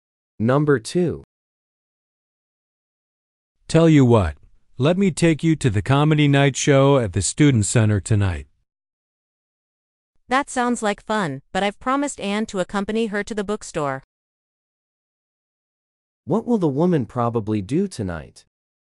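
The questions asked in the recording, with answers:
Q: What will the woman probably do tonight?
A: Go to the bookstore with Anne.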